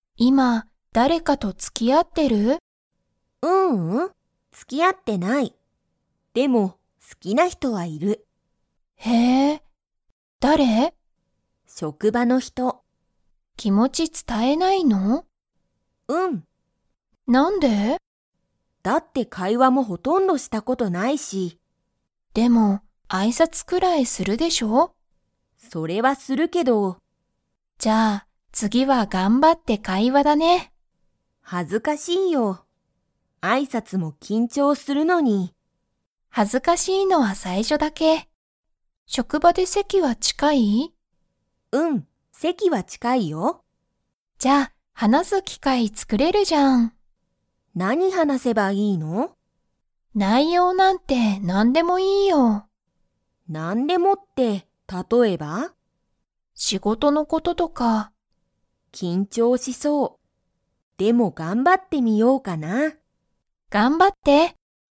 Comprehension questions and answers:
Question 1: リカは、 の人ひとが好すきだ。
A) 職場しょくば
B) 挨拶あいさつ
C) 気持きもち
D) 大学だいがく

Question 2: リカは、好すきな人ひとと席せきが近ちかいですか?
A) はい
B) いいえ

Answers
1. A
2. A

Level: Level 4

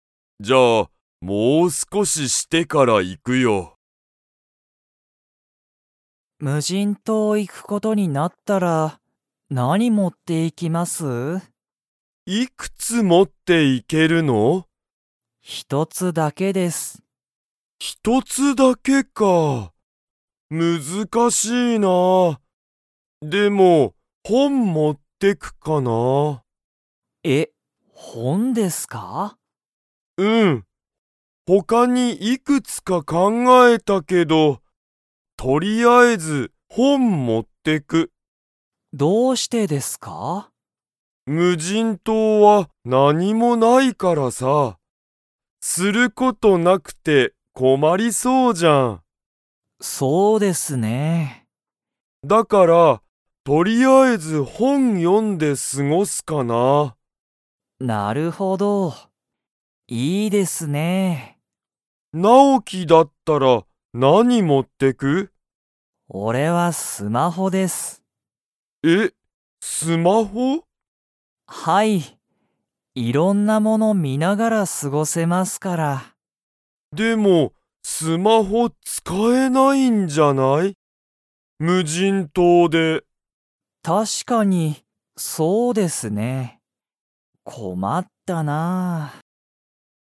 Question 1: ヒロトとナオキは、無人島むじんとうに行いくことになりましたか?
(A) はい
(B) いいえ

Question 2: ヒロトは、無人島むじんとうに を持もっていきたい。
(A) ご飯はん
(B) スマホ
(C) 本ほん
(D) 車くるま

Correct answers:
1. B
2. C

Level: Level 3

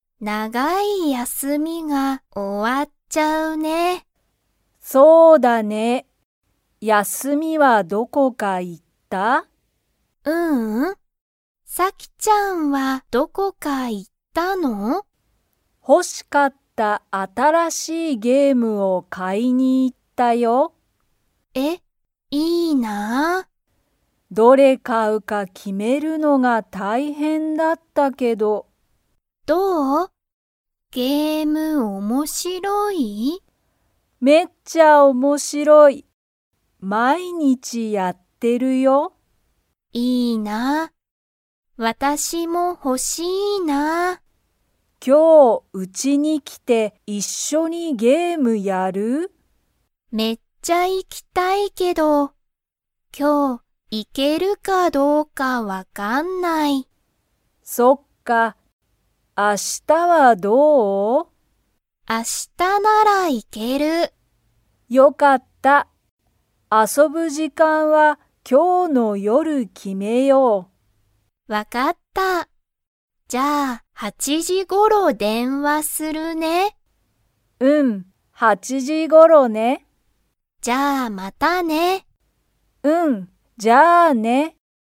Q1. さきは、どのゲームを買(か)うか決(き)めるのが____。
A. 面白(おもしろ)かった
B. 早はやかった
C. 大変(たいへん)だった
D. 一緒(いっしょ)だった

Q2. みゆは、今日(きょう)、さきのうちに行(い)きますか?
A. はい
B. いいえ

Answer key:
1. C
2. B

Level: Level 2

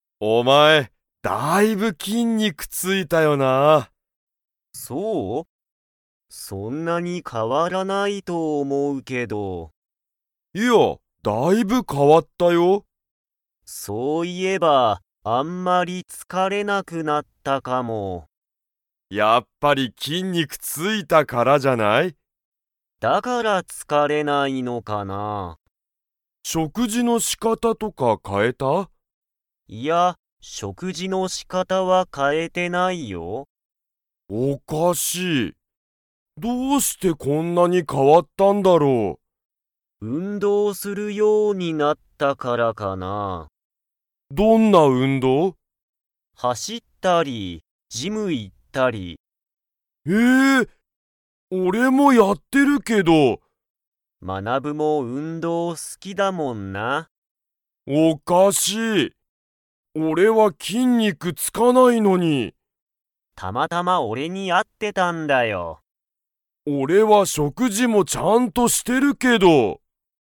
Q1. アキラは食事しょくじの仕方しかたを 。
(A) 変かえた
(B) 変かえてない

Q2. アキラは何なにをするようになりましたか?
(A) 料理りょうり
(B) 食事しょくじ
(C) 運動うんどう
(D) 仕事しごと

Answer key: 1B, 2C

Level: Level 4

